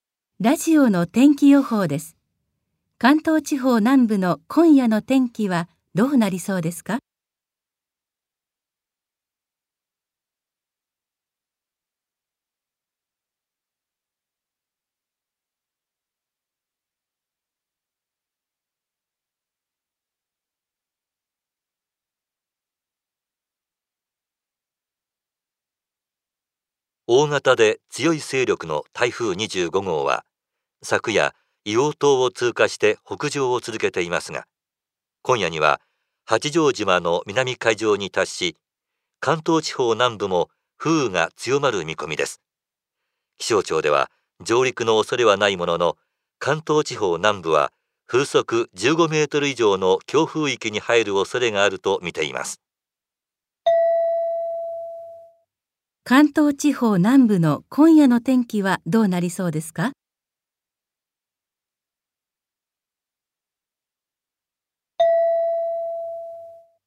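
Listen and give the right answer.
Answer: 風雨が強まる(風速15メートル以上の強風になるおそれがある)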